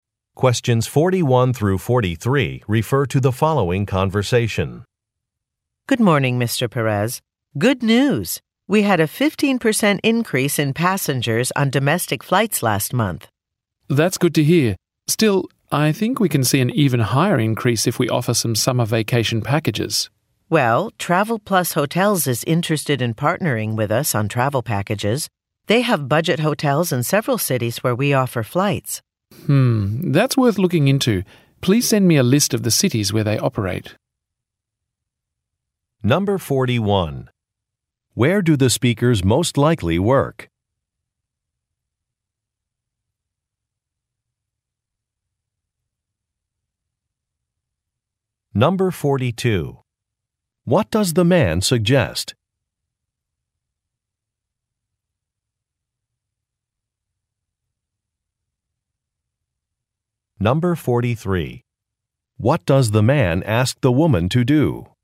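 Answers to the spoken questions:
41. At an airline
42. Offering summer vacation packages
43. Send him a list of the cities where Travel Plus Hotels operates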